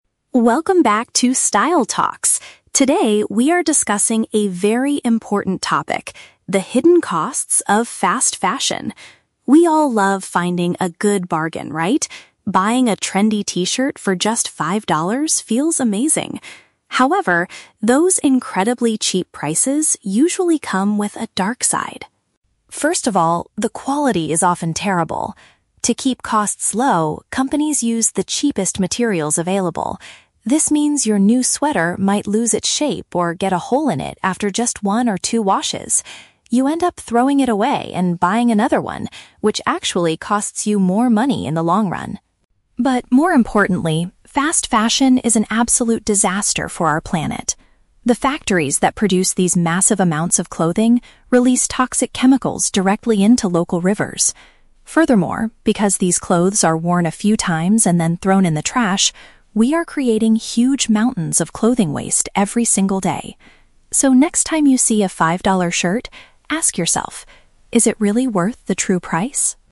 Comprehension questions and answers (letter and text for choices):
Listen to the podcast episode about the clothing industry. For each question, choose the correct answer (A, B, or C).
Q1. According to the host, what is a common problem with cheap clothing?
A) It actually saves you a lot of money in the long run.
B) It damages easily and needs to be replaced quickly.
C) It is made from materials that feel uncomfortable to wear.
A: B) It damages easily and needs to be replaced quickly.

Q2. How does the fast fashion industry directly damage the environment?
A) Production factories pollute the water with dangerous substances.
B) People burn their old clothes, which creates air pollution.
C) The factories use too much electricity to run their machines.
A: A) Production factories pollute the water with dangerous substances.

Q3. What is the host's final piece of advice for the listeners?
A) Stop buying any t-shirts that cost less than five dollars.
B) Only buy your clothes from second-hand charity shops.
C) Think carefully about the real impact before buying cheap items.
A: C) Think carefully about the real impact before buying cheap items.

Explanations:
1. The host says cheap clothes have "terrible" quality, use the "cheapest materials," and might "get a hole in it after just one or two washes," which is paraphrased as damaging easily. Option A is the trap; the host says buying cheap clothes actually "costs you more money in the long run." Option C is plausible but the host doesn't mention how the clothes feel, only how quickly they break.
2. The host states that factories "release toxic chemicals directly into local rivers." "Toxic chemicals" are paraphrased as "dangerous substances," and rivers represent the water. Option B is a trap; the host mentions mountains of clothing waste because they are "thrown in the trash," but does not mention burning them. Option C is plausible for factories but is never mentioned in the audio.
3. At the end, the host advises, "next time you see a five-dollar shirt, ask yourself: is it really worth the true price?" This means you should think carefully about the impact. Option A is a trap; a five-dollar shirt is used as an example, but there is no strict rule to stop buying them entirely based on a specific price. Option B is a great real-world solution to fast fashion, but it is not mentioned in this podcast.

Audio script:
Host: Welcome back to 'Style Talks'. Today, we are discussing a very important topic: the hidden costs of 'Fast Fashion'. We all love finding a good bargain, right? Buying a trendy t-shirt for just five dollars feels amazing. However, those incredibly cheap prices usually come with a dark side.
First of all, the quality is often terrible. To keep costs low, companies use the cheapest materials available. This means your new sweater might lose its shape or get a hole in it after just one or two washes. You end up throwing it away and buying another one, which actually costs you more money in the long run.
But more importantly, fast fashion is an absolute disaster for our planet. The factories that produce these massive amounts of clothing release toxic chemicals directly into local rivers. Furthermore, because these clothes are worn a few times and then thrown in the trash, we are creating huge mountains of clothing waste every single day. So, next time you see a five-dollar shirt, ask yourself: is it really worth the true price?